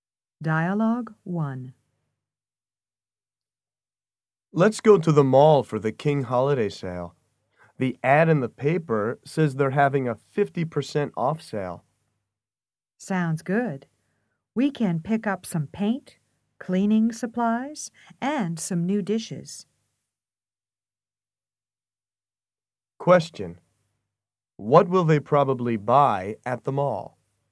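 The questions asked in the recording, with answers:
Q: What will they probably buy at the mall?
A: Paint, cleaning supplies, and new dishes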